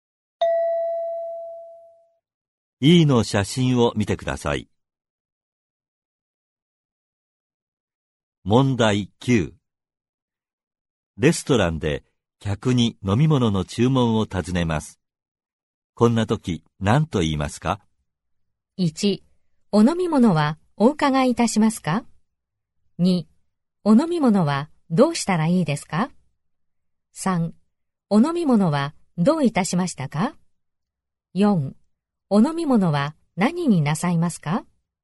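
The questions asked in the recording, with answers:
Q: レストランで客に飲み物の注文を尋ねます。こんな時何と言いますか?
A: 4: お飲み物は何になさいますか?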